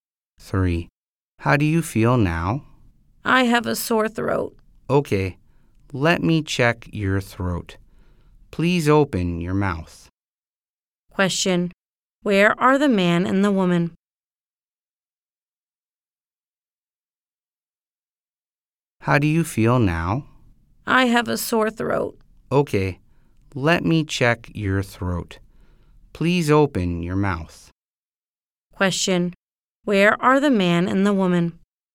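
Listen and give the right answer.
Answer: At a doctor's office (hospital).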